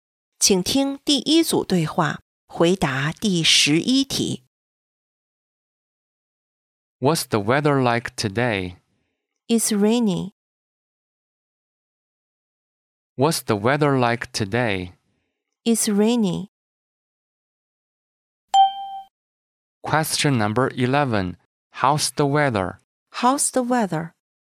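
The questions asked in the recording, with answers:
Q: How's the weather?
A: It's rainy.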